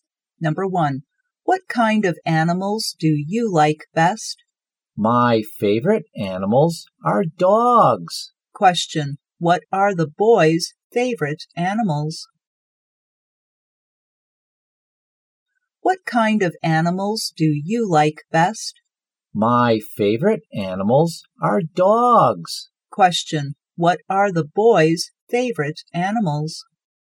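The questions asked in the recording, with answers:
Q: what are the boys' favorite animals?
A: Dogs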